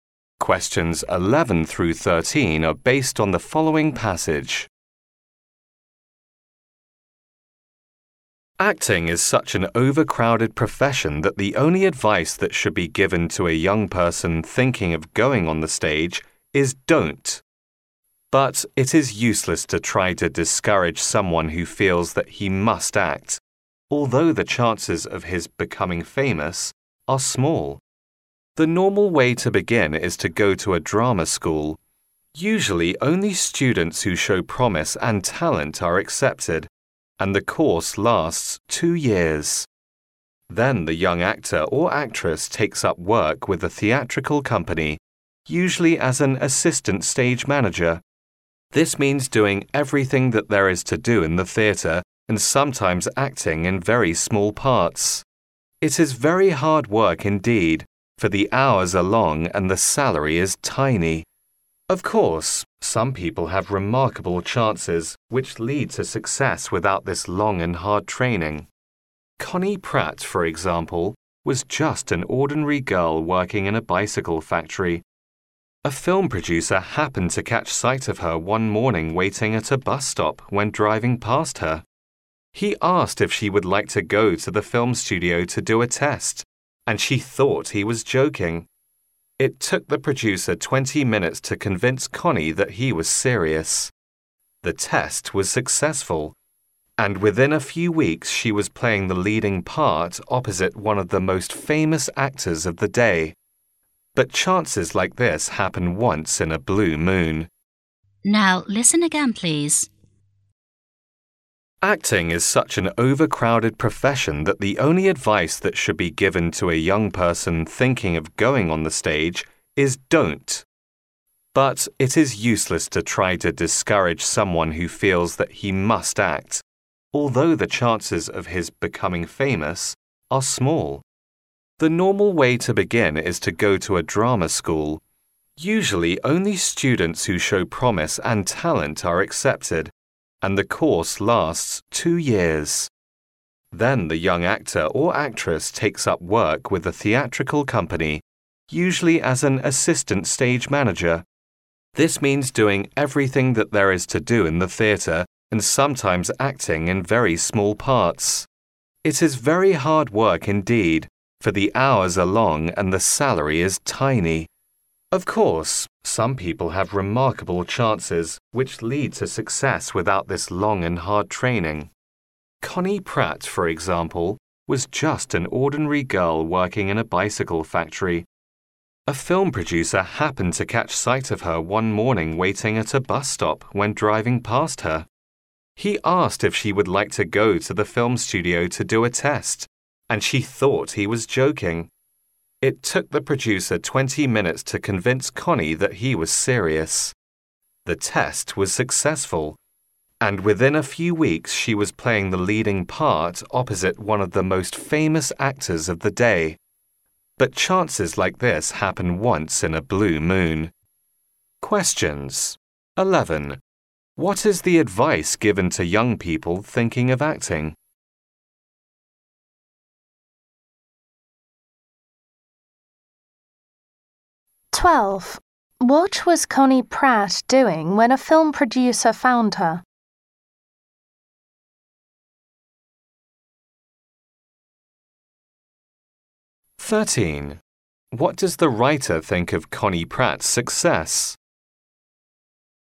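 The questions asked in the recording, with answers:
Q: What is the advice given to young people thinking of acting?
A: Don't go on the stage

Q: What was Connie Pratt doing when a film producer found her?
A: Waiting at a bus stop

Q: What does the writer think of Connie Pratt's success?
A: It happens very rarely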